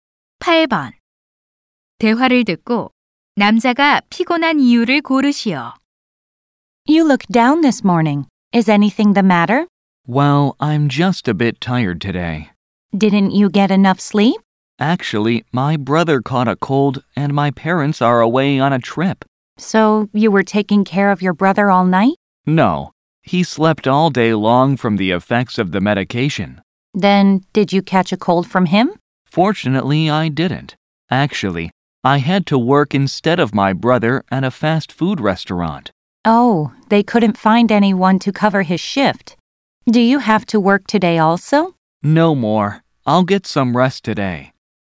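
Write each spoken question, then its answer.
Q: 대화를 듣고 남자가 피곤한 이유를 고르시오.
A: 동생 대신 패스트푸드점에서 일해서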